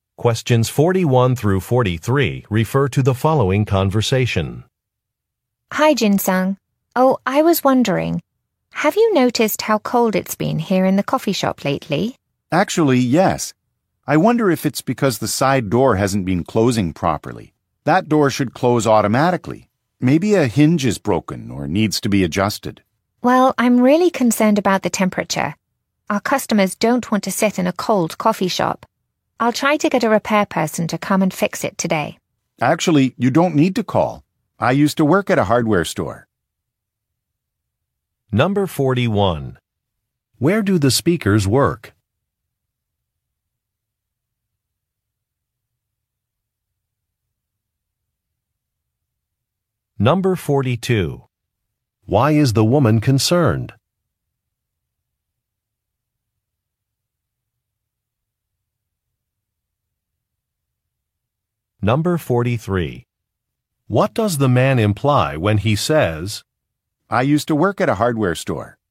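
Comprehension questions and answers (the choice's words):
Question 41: Where do the speakers work?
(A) At a bank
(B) At a coffee shop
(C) At a bookstore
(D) At a medical clinic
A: At a coffee shop

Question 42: Why is the woman concerned?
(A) Her inventory is low.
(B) She lost some contact information.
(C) A seating area is too cold.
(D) Road construction is disruptive.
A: A seating area is too cold.

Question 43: What does the man imply when he says, "I used to work at a hardware store"?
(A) He can fix a problem.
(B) He has experience in customer service.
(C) He is not interested in an offer.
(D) He is excited about teaching a new course.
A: He can fix a problem.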